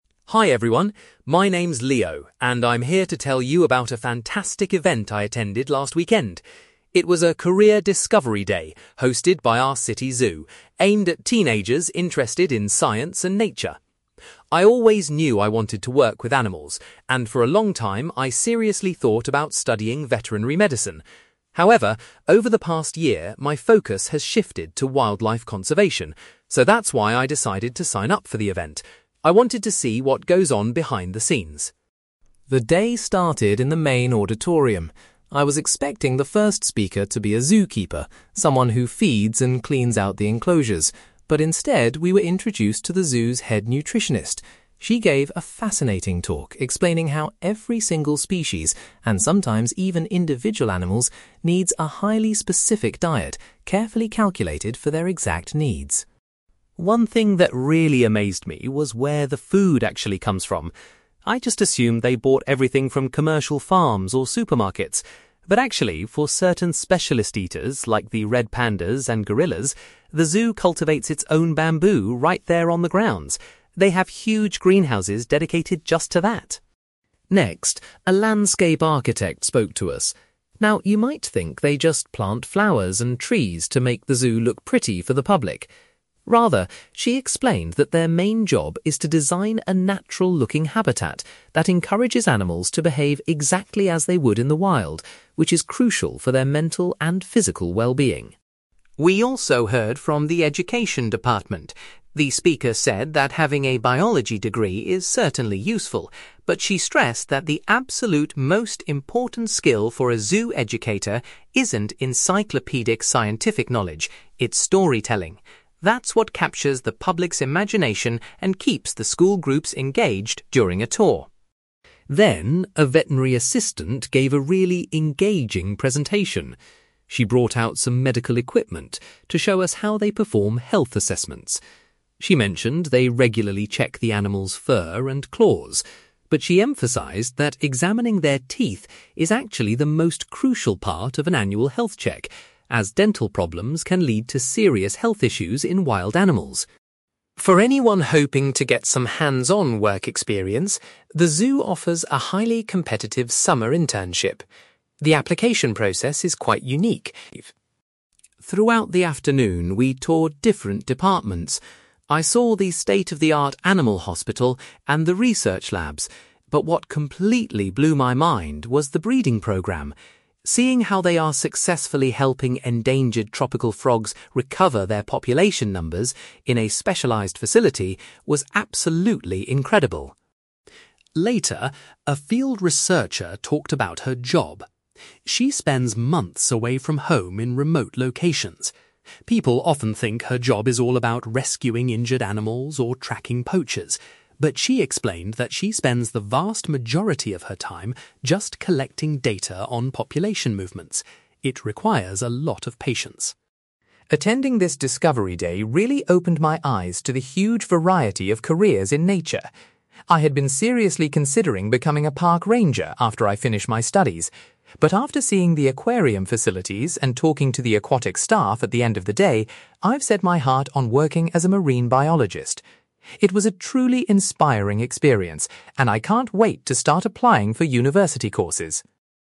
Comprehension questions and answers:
You will hear a young man called Leo giving a presentation about a Career Discovery Day he attended at a local zoo. For questions 9-18, complete the sentences with a word or short phrase.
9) Leo attended the Career Discovery Day because of his growing interest in (9)........................... .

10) Leo was surprised that the first presentation was given by a (10)........................... .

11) Leo was amazed to learn that the zoo grows its own (11)........................... for some of the animals.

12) The landscape architect's primary responsibility is to create a realistic (12)........................... for the animals.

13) According to the zoo educator, possessing good (13)........................... is the most vital skill for their role.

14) The veterinary assistant highlighted the importance of inspecting the animals' (14)........................... during regular check-ups.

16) Leo was particularly impressed by the zoo's (16)........................... for endangered frogs.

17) A field researcher explained that her primary task involves gathering (17)........................... about animal populations.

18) After visiting the aquatic facilities, Leo has decided he wants to be a (18)........................... in the future.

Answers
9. wildlife conservation
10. nutritionist
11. bamboo
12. habitat
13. storytelling
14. teeth
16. breeding programme
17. data
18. marine biologist

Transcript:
Leo: Hi everyone. My name's Leo, and I'm here to tell you about a fantastic event I attended last weekend. It was a Career Discovery Day hosted by our city zoo, aimed at teenagers interested in science and nature. I always knew I wanted to work with animals, and for a long time, I seriously thought about studying veterinary medicine. However, over the past year, my focus has shifted to wildlife conservation, so that's why I decided to sign up for the event. I wanted to see what goes on behind the scenes.
The day started in the main auditorium. I was expecting the first speaker to be a zookeeper—someone who feeds and cleans out the enclosures—but instead, we were introduced to the zoo's head nutritionist. She gave a fascinating talk explaining how every single species, and sometimes even individual animals, needs a highly specific diet carefully calculated for their exact needs.
One thing that really amazed me was where the food actually comes from. I just assumed they bought everything from commercial farms or supermarkets. But actually, for certain specialist eaters like the red pandas and gorillas, the zoo cultivates its own bamboo right there on the grounds. They have huge greenhouses dedicated just to that!
Next, a landscape architect spoke to us. Now, you might think they just plant flowers and trees to make the zoo look pretty for the public. Rather, she explained that their main job is to design a natural-looking habitat that encourages animals to behave exactly as they would in the wild, which is crucial for their mental and physical wellbeing.
We also heard from the education department. The speaker said that having a biology degree is certainly useful, but she stressed that the absolute most important skill for a zoo educator isn't encyclopedic scientific knowledge, it's storytelling. That's what captures the public's imagination and keeps the school groups engaged during a tour.
Then, a veterinary assistant gave a really engaging presentation. She brought out some medical equipment to show us how they perform health assessments. She mentioned they regularly check the animals' fur and claws, but she emphasized that examining their teeth is actually the most crucial part of an annual health check, as dental problems can lead to serious health issues in wild animals.
For anyone hoping to get some hands-on work experience, the zoo offers a highly competitive summer internship. The application process is quite unique.
Throughout the afternoon, we toured different departments. I saw the state-of-the-art animal hospital and the research labs, but what completely blew my mind was the breeding programme. Seeing how they are successfully helping endangered tropical frogs recover their population numbers in a specialized facility was absolutely incredible.
Later, a field researcher talked about her job. She spends months away from home in remote locations. People often think her job is all about rescuing injured animals or tracking poachers, but she explained that she spends the vast majority of her time just collecting data on population movements. It requires a lot of patience.
Attending this Discovery Day really opened my eyes to the huge variety of careers in nature. I had been seriously considering becoming a park ranger after I finish my studies. But after seeing the aquarium facilities and talking to the aquatic staff at the end of the day, I've set my heart on working as a marine biologist. It was a truly inspiring experience and I can't wait to start applying for university courses.

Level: B2